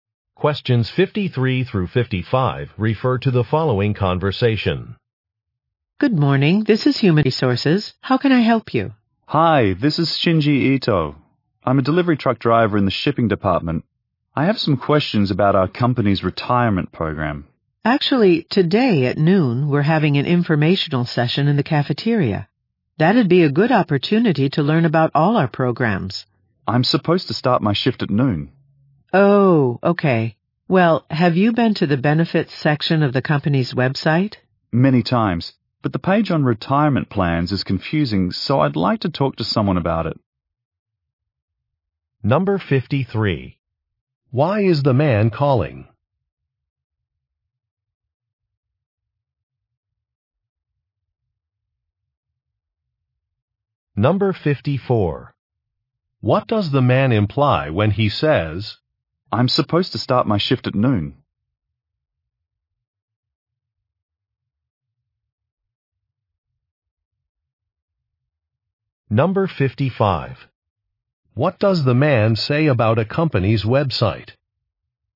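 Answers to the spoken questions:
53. To ask about the retirement program
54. He cannot attend the information session
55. The retirement page is confusing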